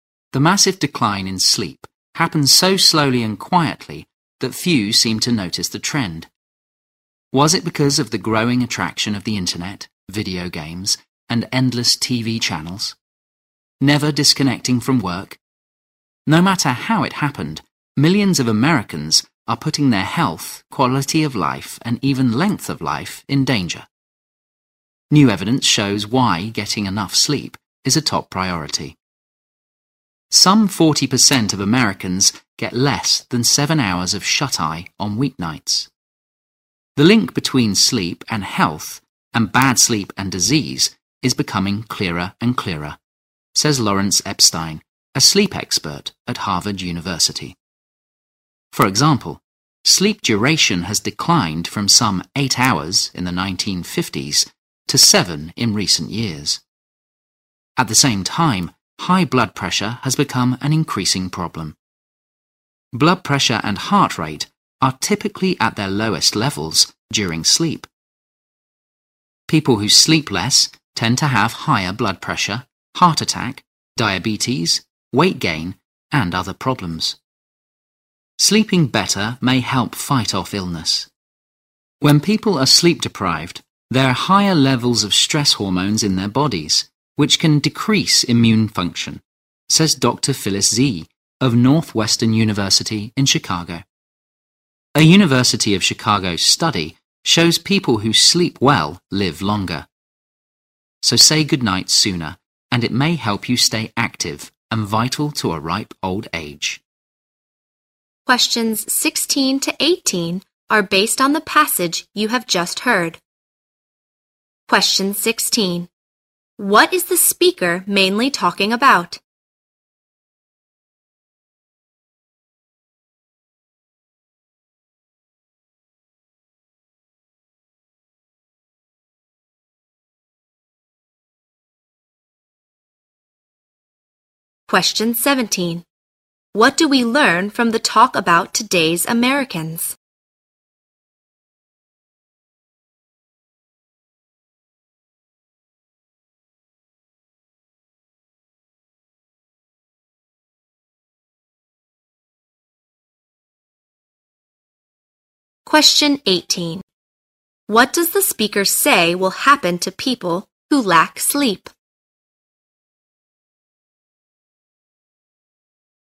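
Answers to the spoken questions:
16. The importance of getting enough sleep for health
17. Many get less sleep than before; about 40% get under 7 hours on weeknights
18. Their health suffers: higher blood pressure, heart attack risk, and weaker immune function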